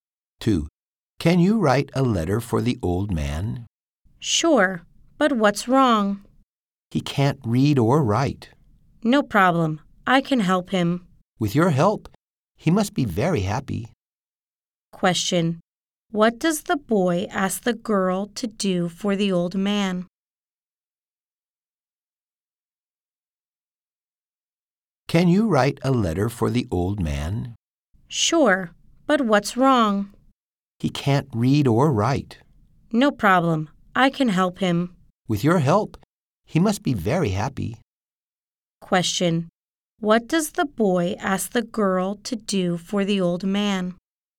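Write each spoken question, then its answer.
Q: What does the boy ask the girl to do for the old man?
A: Write a letter for him.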